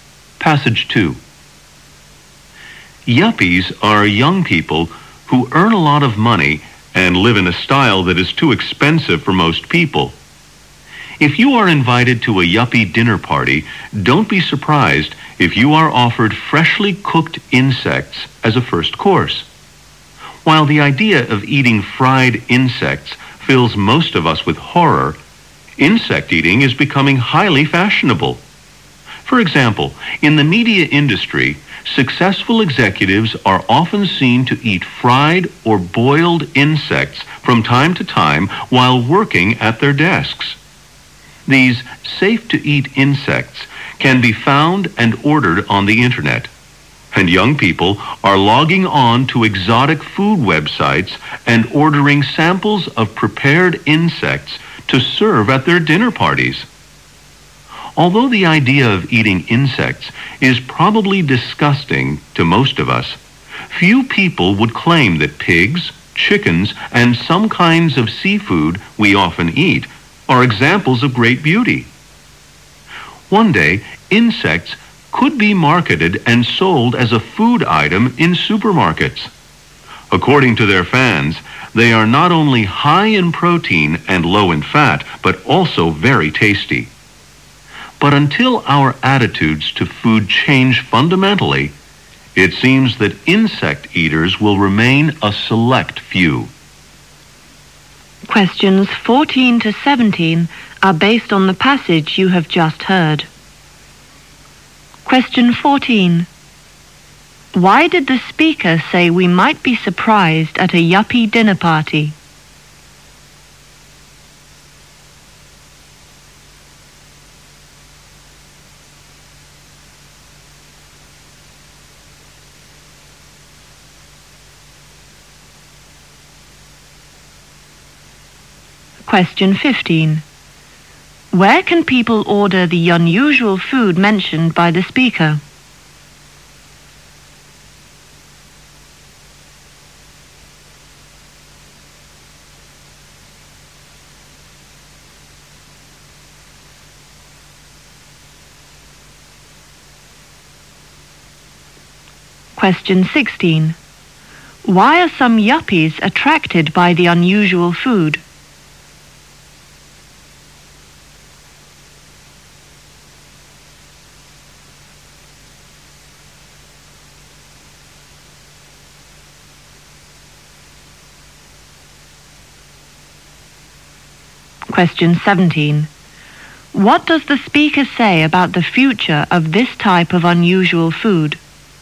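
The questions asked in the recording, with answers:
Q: Why did the speaker say we might be surprised at a yuppie dinner party?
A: We might be offered freshly cooked insects as a first course

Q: Where can people order the unusual food mentioned by the speaker?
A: On the internet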